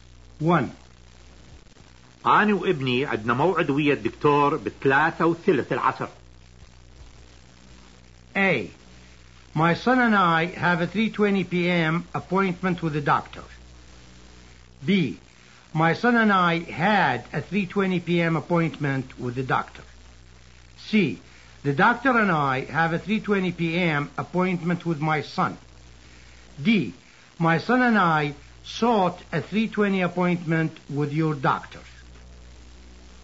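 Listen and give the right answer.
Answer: A: My son and I have a 3:20 p.m. appointment with the doctor.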